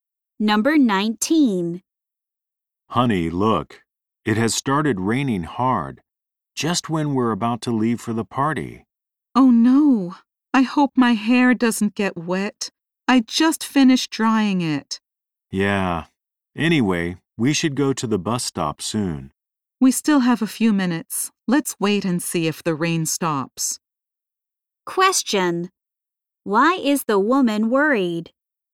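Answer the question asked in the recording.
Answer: Her hair might get wet in the rain.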